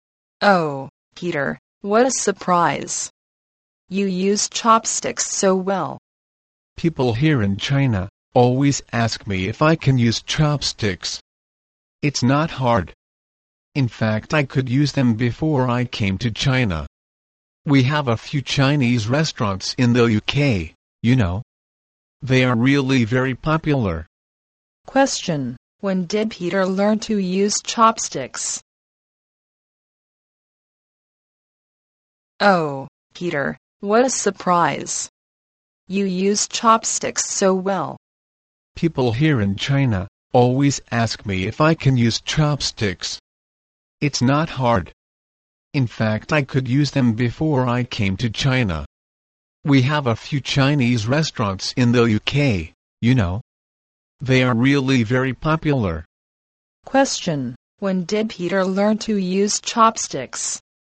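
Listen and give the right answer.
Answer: Before he came to China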